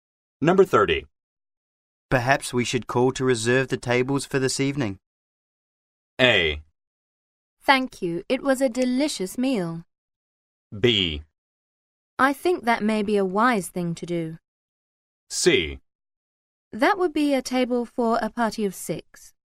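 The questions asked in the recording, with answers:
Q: Perhaps we should call to reserve the tables for this evening.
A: B: I think that may be a wise thing to do.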